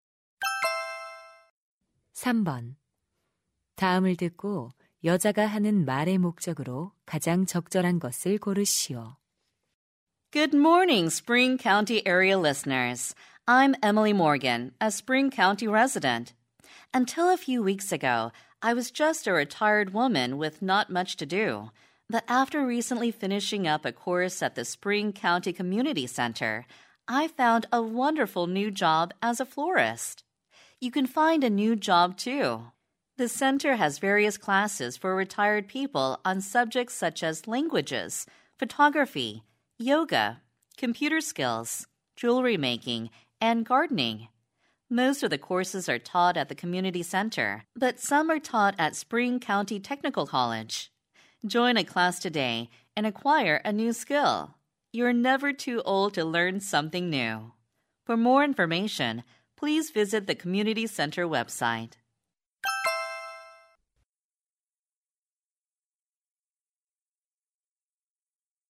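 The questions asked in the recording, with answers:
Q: 다음을 듣고 여자가 하는 말의 목적으로 가장 적절한 것을 고르시오.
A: 은퇴자를 위한 지역 커뮤니티 센터 강좌를 홍보하려고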